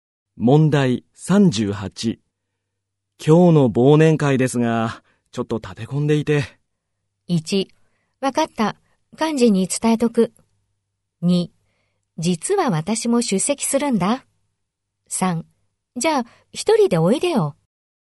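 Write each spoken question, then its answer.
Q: 今日の忘年会ですが、ちょっと立て込んでいて。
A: 1: わかった。幹事に伝えとく。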